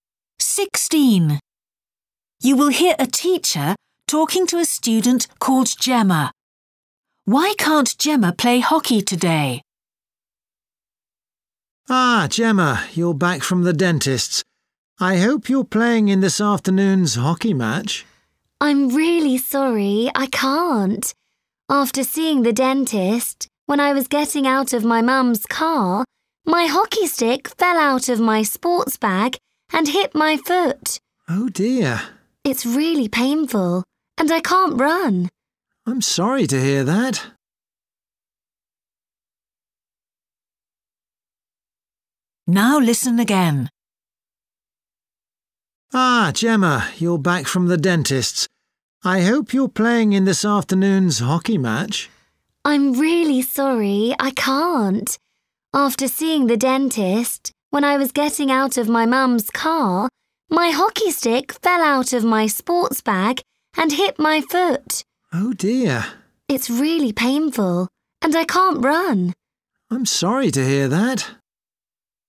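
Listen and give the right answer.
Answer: Her hockey stick fell on her foot and hurt it, so she can't run.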